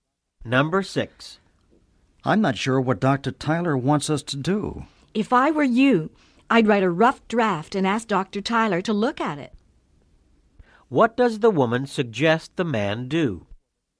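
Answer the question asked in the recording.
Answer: Write a rough draft and ask Dr. Tyler to look at it.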